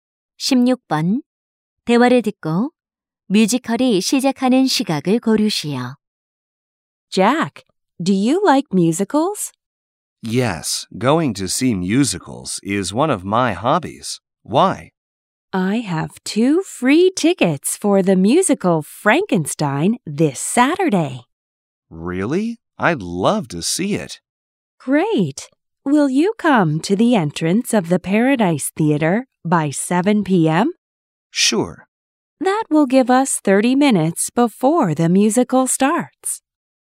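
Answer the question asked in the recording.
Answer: 오후 7시 30분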